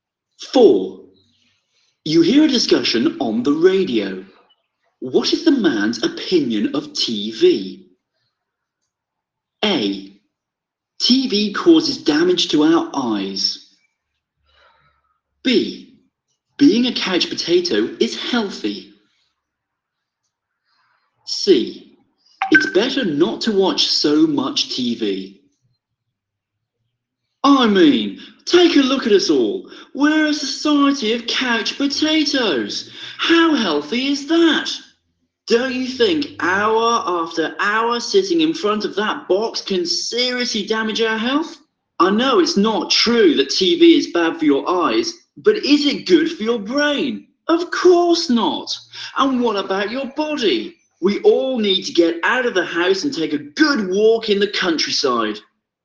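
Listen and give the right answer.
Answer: C: It's better not to watch so much TV.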